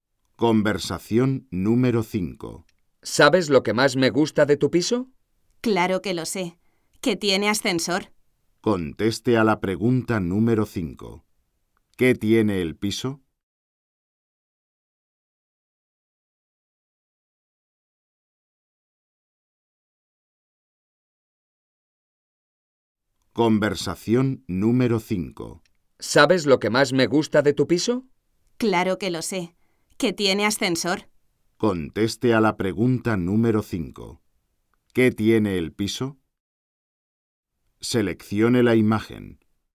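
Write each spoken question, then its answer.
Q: ¿Qué tiene el piso?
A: Ascensor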